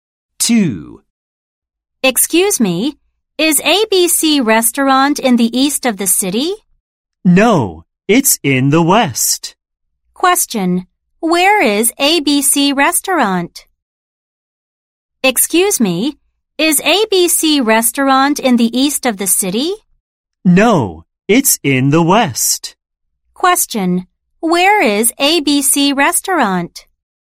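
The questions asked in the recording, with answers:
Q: where is ABC Restaurant?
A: In the west of the city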